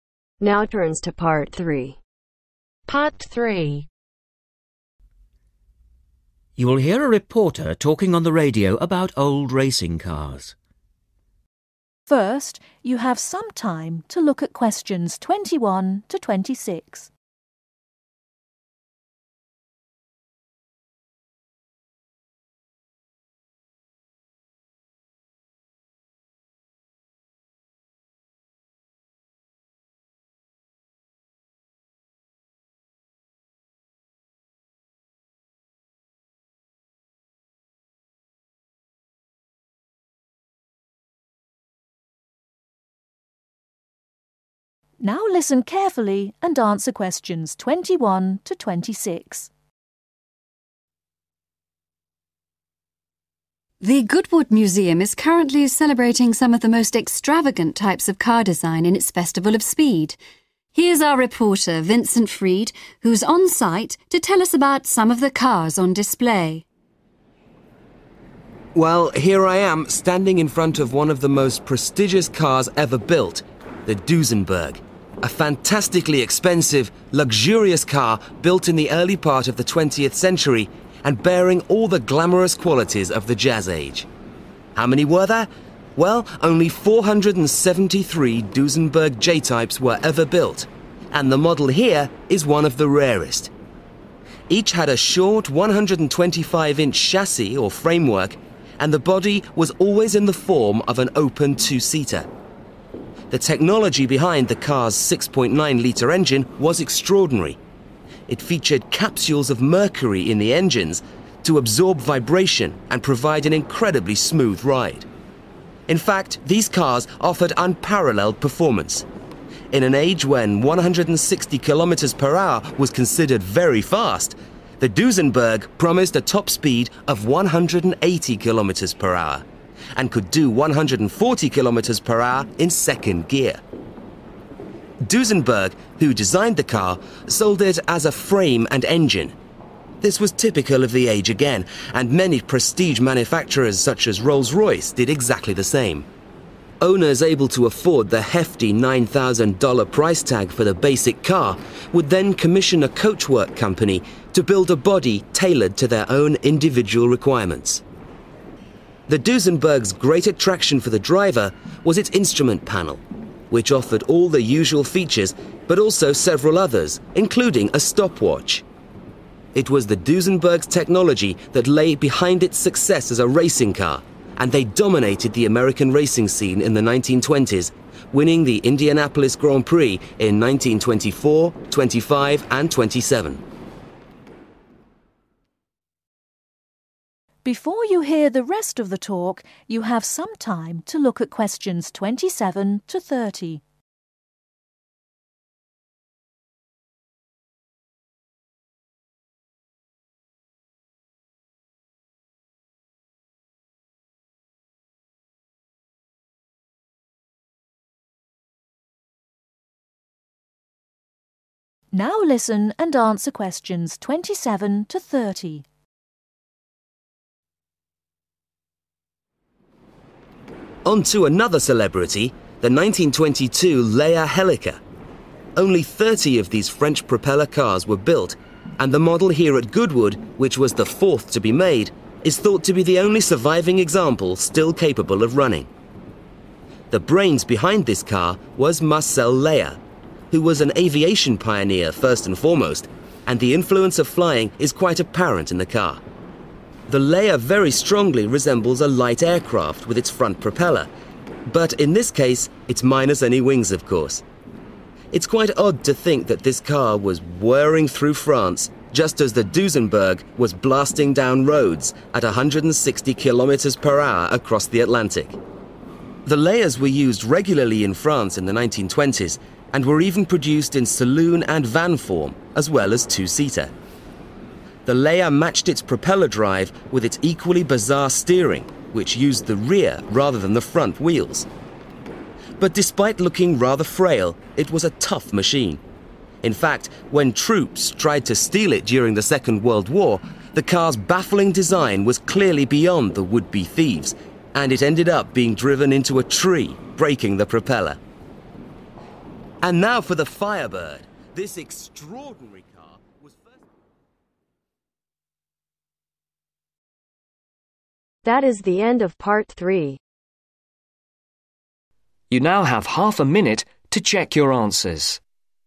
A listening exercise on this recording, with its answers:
Complete the notes below. Write NO MORE THAN TWO WORDS OR A NUMBER for each answer.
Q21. Number made: (21)............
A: 473

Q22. Type of body: open (22)............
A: 2 Seater

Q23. Engines contained capsules of mercury to ensure a (23)............ trip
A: smooth

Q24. Top speed: (24).............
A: 180 kilometres

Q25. Sold as a (25) ............. and engine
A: frame

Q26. Main attraction: (26)............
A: instrument panel

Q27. Number built: (27)............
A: 30

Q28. Car looks like a (28)............ without (29)...............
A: light aircraft

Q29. Car looks like a (28)............ without (29)...............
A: wings

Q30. Steering used the (30)............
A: rear wheels